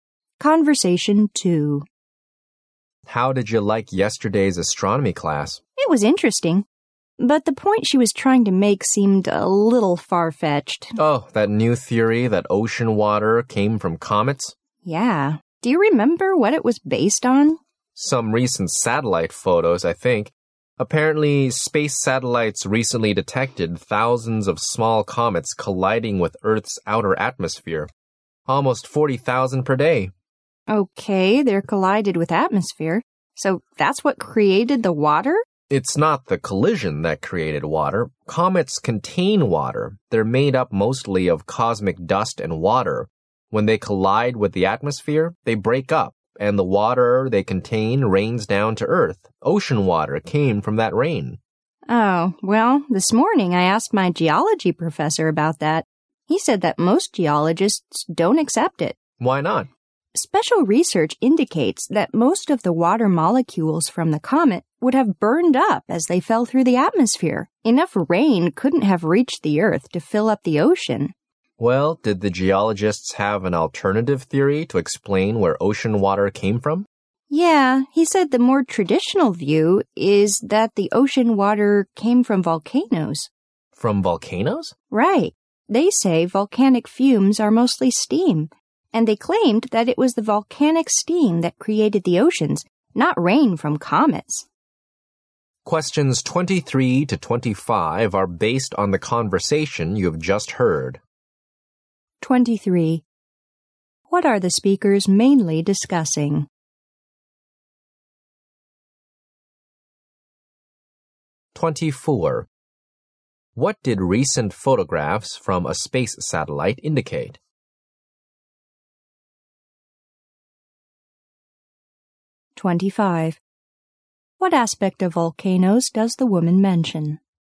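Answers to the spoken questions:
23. Where ocean water came from
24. Thousands of small comets collide with Earth's outer atmosphere
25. Their fumes are mostly steam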